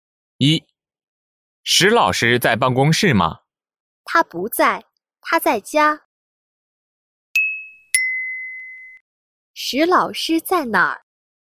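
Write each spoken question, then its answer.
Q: 石老师在哪儿?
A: 在家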